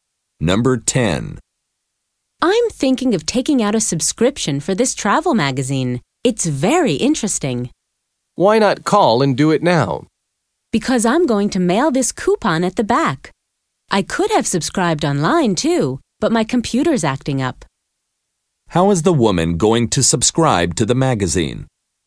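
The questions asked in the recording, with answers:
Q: How is the woman going to subscribe to the magazine?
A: By mailing the coupon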